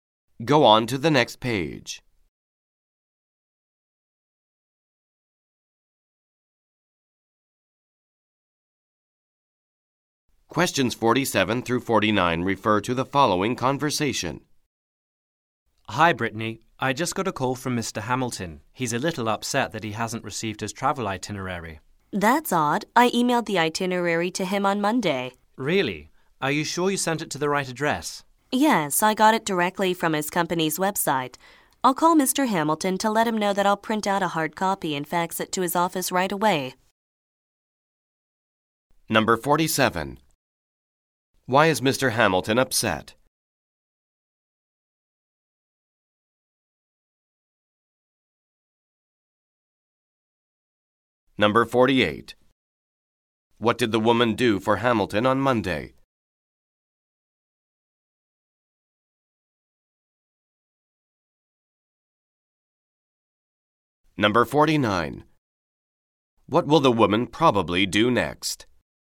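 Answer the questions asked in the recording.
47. He hasn't received his travel itinerary
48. She emailed him the itinerary
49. Call Mr. Hamilton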